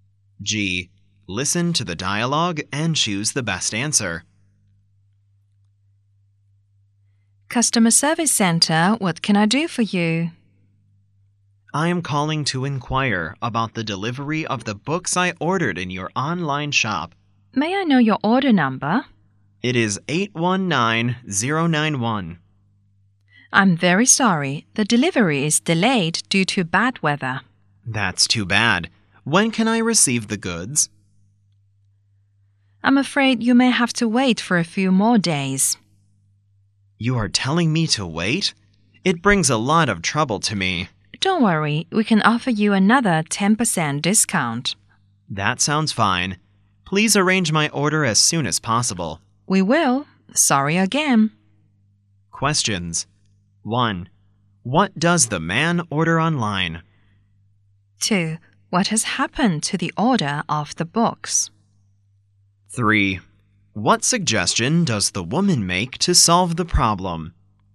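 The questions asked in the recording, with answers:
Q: What does the man order online?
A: Books

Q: What has happened to the order of the books?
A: The delivery is delayed due to bad weather

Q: What suggestion does the woman make to solve the problem?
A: Wait a few more days and get another 10% discount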